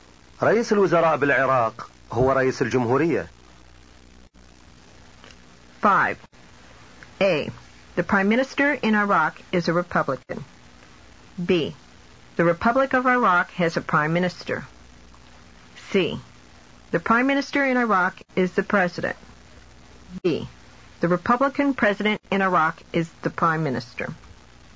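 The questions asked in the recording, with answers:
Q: رئيس الوزراء بالعراق هو رئيس الجمهورية.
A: C: The Prime Minister in Iraq is the President.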